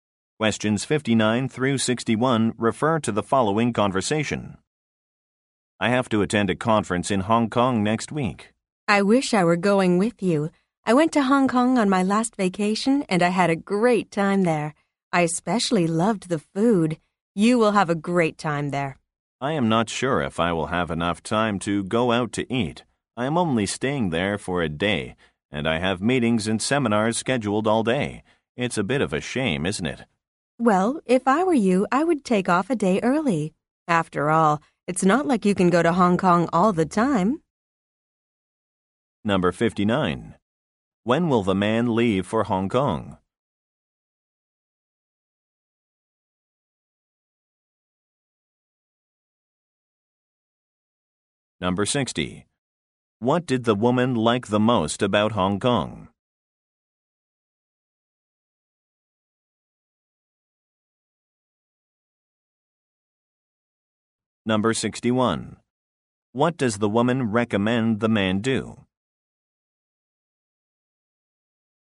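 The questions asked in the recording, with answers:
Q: When will the man leave for Hong Kong?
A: Next week

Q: What did the woman like the most about Hong Kong?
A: The food

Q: What does the woman recommend the man do?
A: Take off a day early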